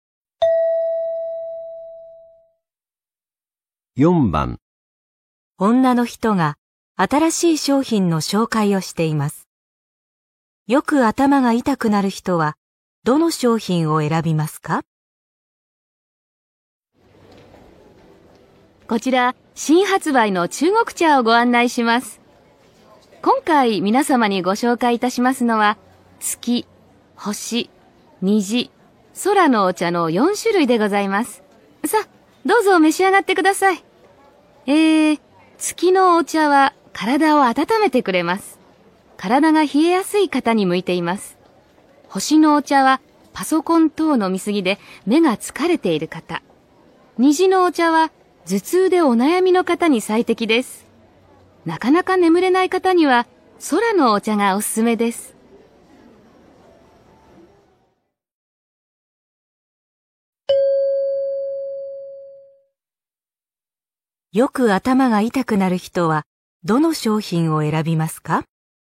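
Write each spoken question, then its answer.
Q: よく頭が痛くなる人はどの商品を選びますか?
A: 虹のお茶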